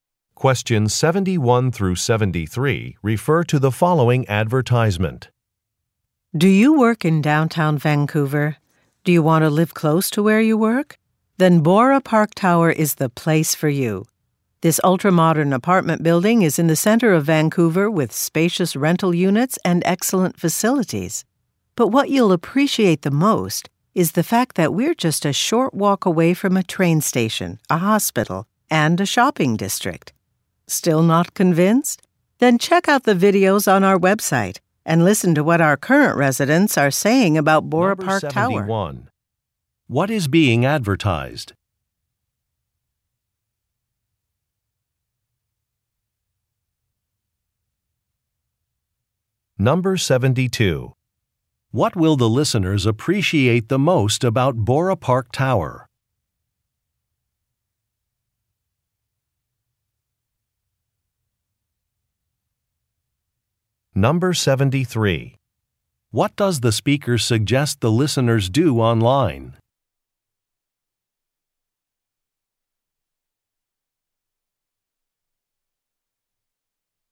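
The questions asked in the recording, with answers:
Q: What is being advertised?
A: An apartment building (Bora Park Tower)

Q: What will the listeners appreciate the most about Bora Park Tower?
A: It's a short walk from a train station, a hospital, and a shopping district

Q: What does the speaker suggest the listeners do online?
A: Watch videos of current residents talking about the building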